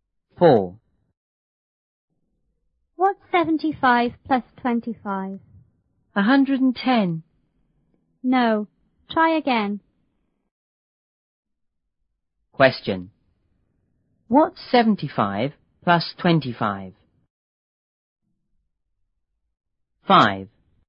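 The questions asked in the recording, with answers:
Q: What's 75 plus 25?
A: 100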